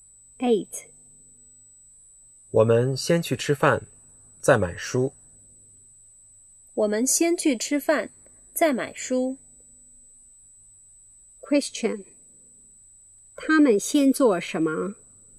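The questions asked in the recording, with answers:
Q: 他们先做什么?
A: 吃饭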